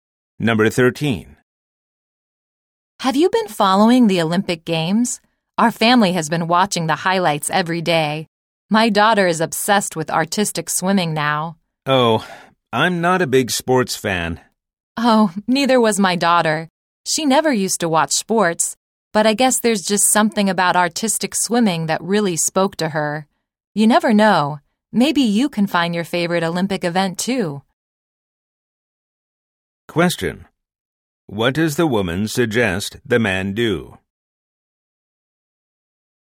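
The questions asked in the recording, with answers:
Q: What does the woman suggest the man do?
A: Watch the Olympics; he might find a favorite event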